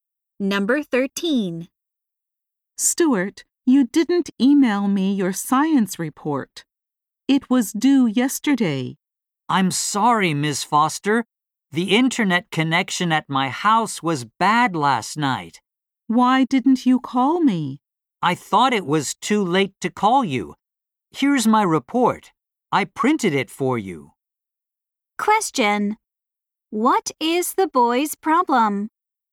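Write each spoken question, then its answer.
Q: What is the boy's problem?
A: He couldn't email his report because his internet connection was bad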